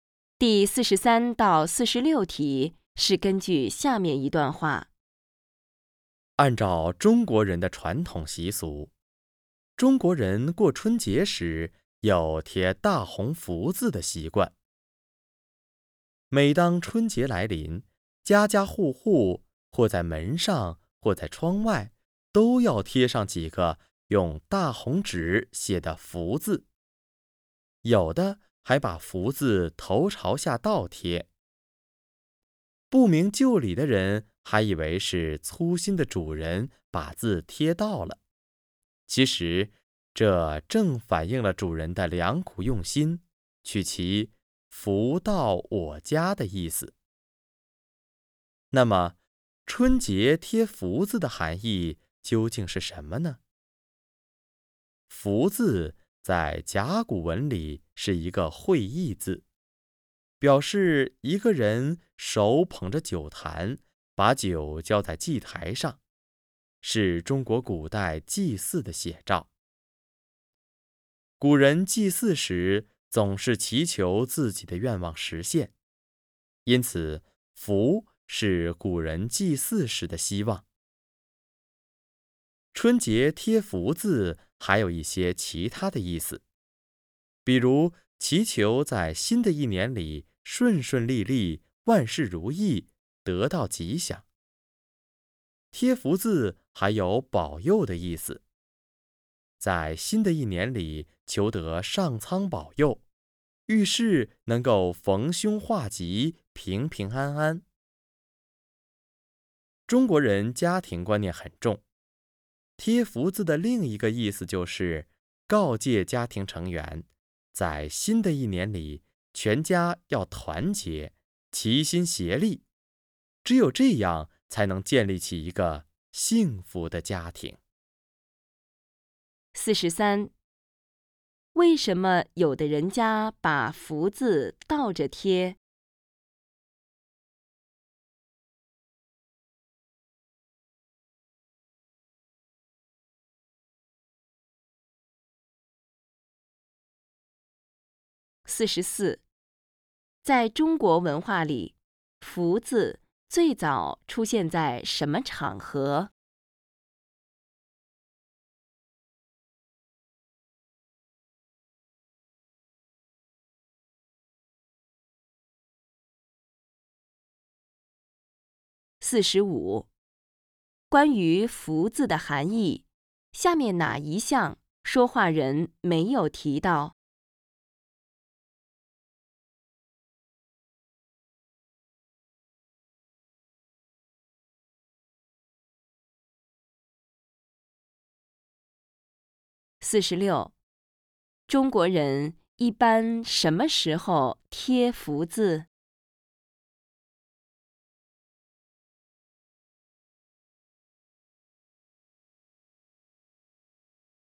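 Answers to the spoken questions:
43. 取福到我家的意思
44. 古代祭祀
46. 春节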